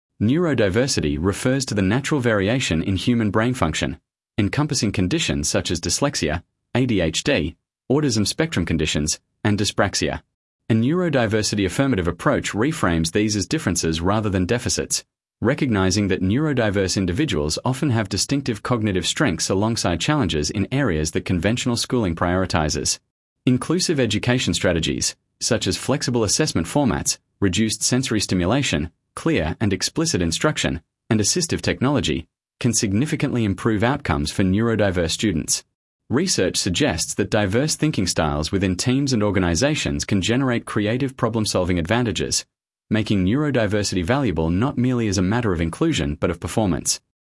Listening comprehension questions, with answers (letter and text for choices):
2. Sample Text 2 — Neurodiversity in Education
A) Neurodiverse students require placement in separate educational facilities to ensure they receive specialised support.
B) Recognising neurodiversity as natural variation rather than disorder can unlock cognitive strengths while ensuring students with significant support needs are not overlooked.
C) The concept of neurodiversity has been proven to be scientifically invalid by recent brain imaging research.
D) All neurodiverse individuals benefit equally from mainstream educational settings without additional support.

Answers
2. B) Recognising neurodiversity as natural variation rather than disorder can unlock cognitive strengths while ensuring students with significant support needs are not overlooked.